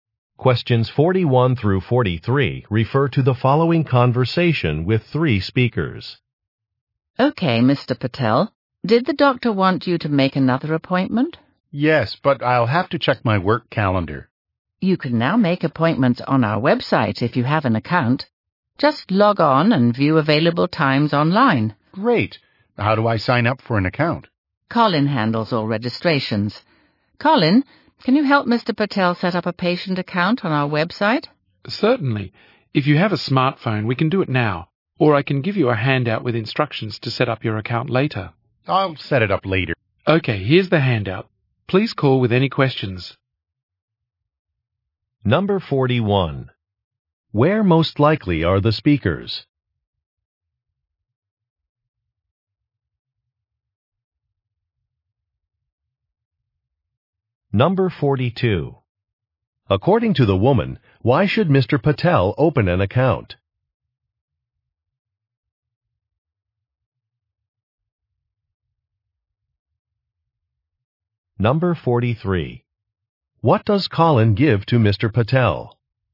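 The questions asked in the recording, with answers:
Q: Where most likely are the speakers?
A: At a doctor's office

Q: According to the woman, why should Mr. Patel open an account?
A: To make appointments online

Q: What does Colin give to Mr. Patel?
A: A handout with instructions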